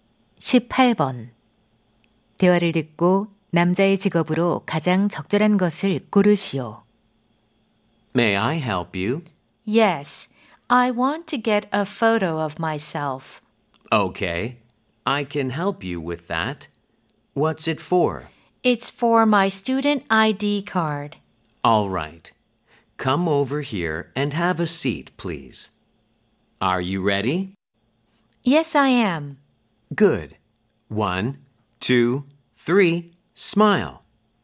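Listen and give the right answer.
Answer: 사진사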